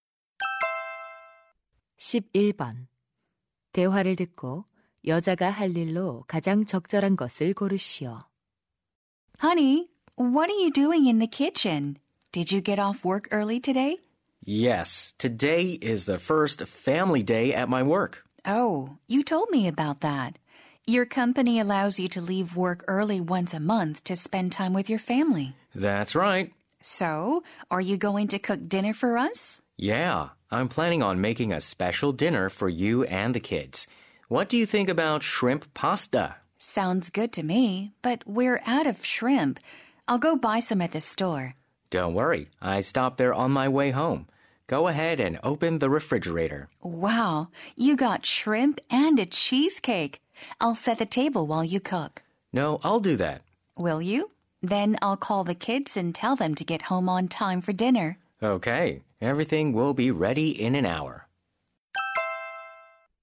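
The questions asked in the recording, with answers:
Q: 대화를 듣고 여자가 할 일로 가장 적절한 것을 고르시오.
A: 아이들에게 전화하기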